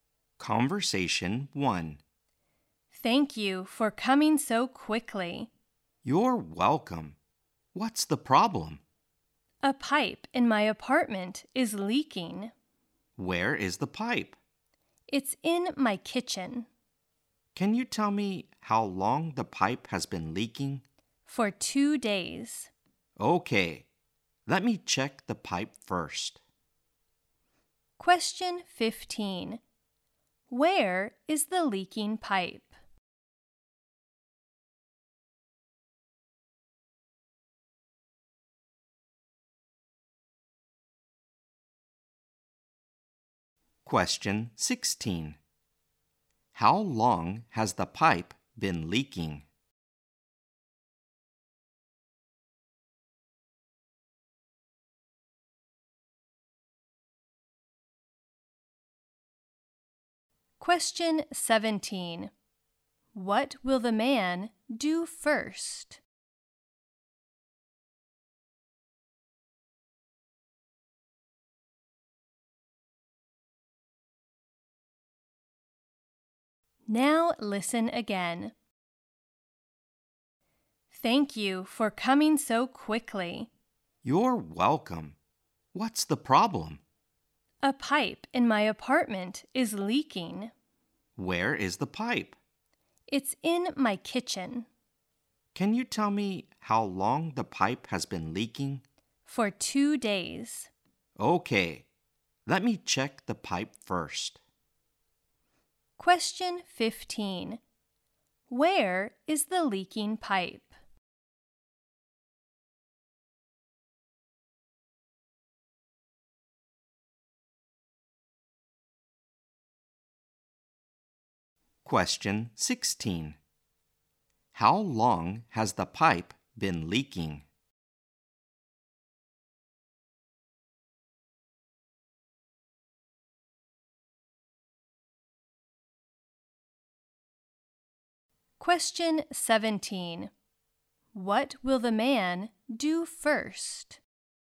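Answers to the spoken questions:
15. In the kitchen of her apartment.
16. For 2 days.
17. Check the pipe.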